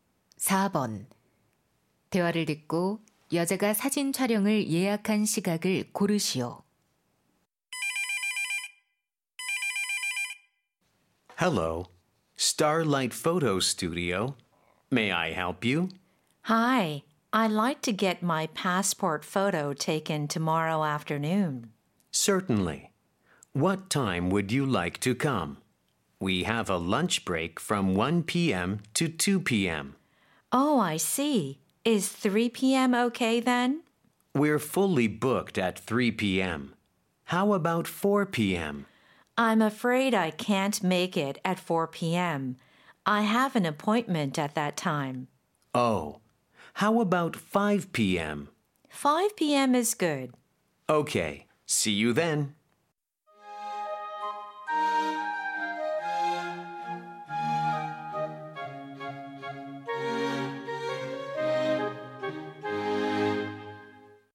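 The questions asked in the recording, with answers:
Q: 대화를 듣고 여자가 사진 촬영을 예약한 시각을 고르시오.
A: 오후 5시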